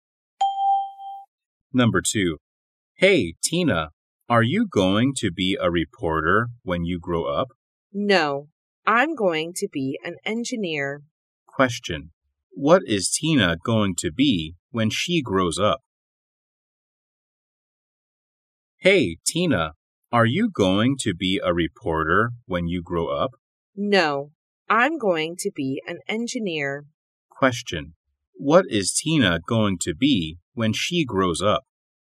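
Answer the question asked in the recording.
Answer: An engineer.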